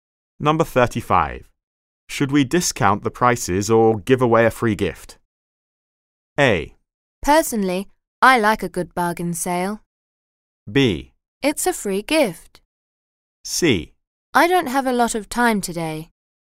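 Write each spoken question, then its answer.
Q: Should we discount the prices or give away a free gift?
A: A: Personally, I like a good bargain sale.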